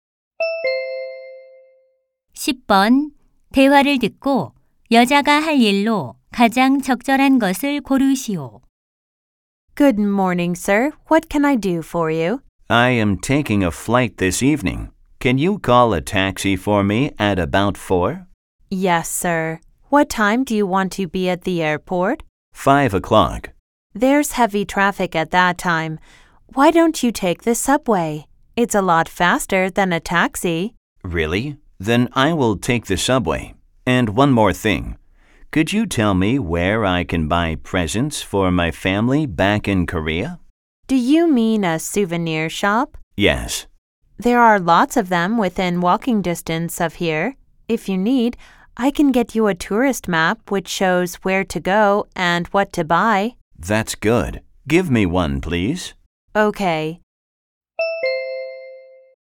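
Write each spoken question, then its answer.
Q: 대화를 듣고 여자가 할 일로 가장 적절한 것을 고르시오.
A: 관광 지도 가져다주기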